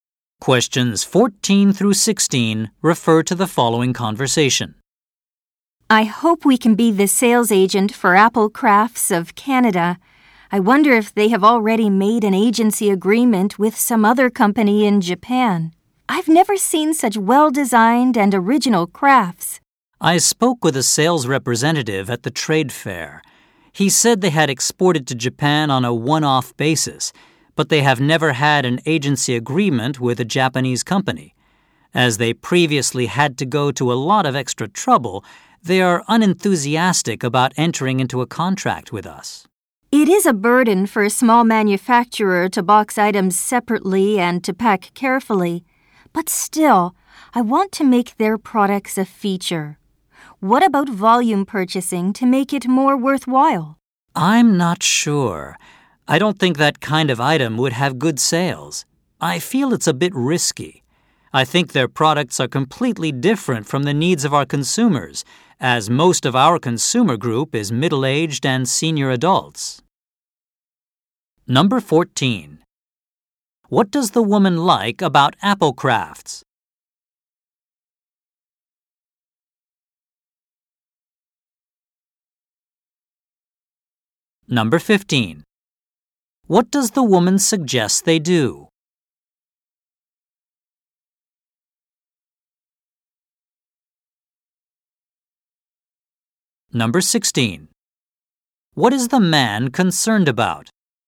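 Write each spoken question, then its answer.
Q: What does the woman like about Apple Crafts?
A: Their crafts are well-designed and original

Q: What does the woman suggest they do?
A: Make a volume purchase

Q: What is the man concerned about?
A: The products don't fit their mostly middle-aged and senior customers, so they may not sell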